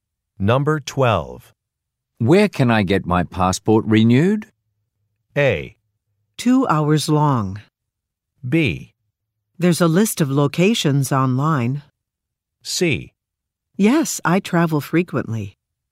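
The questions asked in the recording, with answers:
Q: Where can I get my passport renewed?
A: B: There's a list of locations online.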